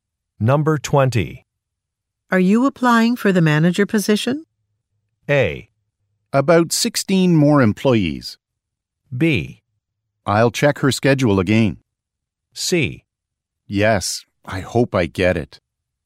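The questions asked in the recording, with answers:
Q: Are you applying for the manager position?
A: C: Yes, I hope I get it.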